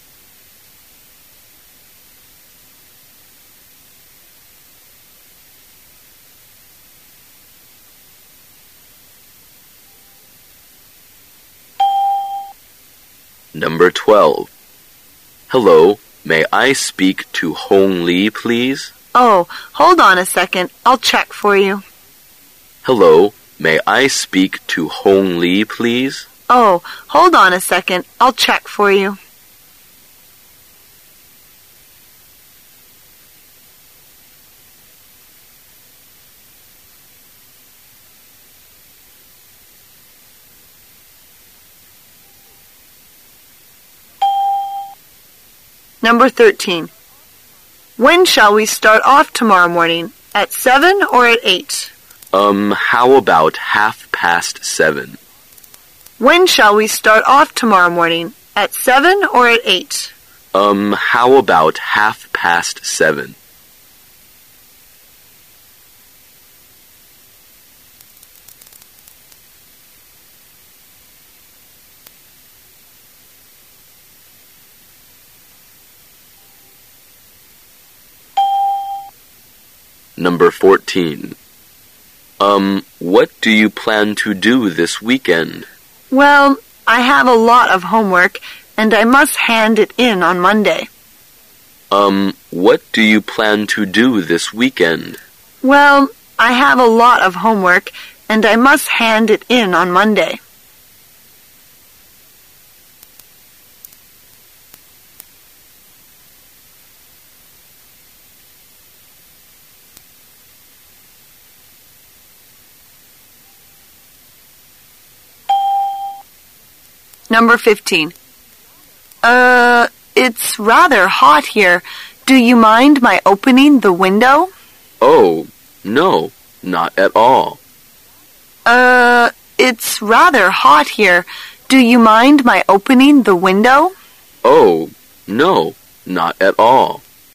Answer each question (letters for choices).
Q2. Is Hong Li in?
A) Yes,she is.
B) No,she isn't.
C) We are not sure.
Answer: C

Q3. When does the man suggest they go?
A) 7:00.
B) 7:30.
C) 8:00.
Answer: B

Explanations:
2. 根据对话内容,男:"你好,我能和 Hong Li说话吗?"女:"请等一下,我给你看一下。"对话中并没有告知Hong Li是否在。故本题答案为C。 [听力原文] M: Hello, may I speak to Hong Li, please? W: Oh, hold on a second, I'll check for you.
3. 女:"我们明天何时出发? 7点还是8点?"男:"7点半怎么样?"故本题答案为B。 [听力原文] W: When shall we start off tomorrow morning, at seven or at eight? M: Um ... how about half past seven?